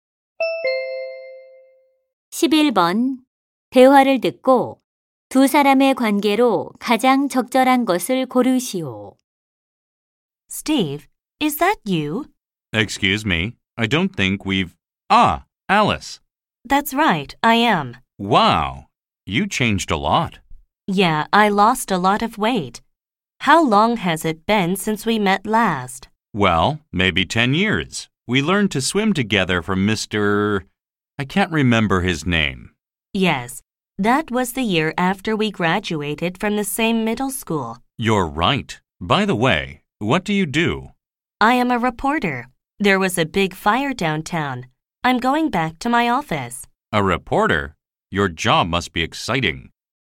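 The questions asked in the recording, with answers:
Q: 대화를 듣고 두 사람의 관계로 가장 적절한 것을 고르시오.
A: 중학교 동창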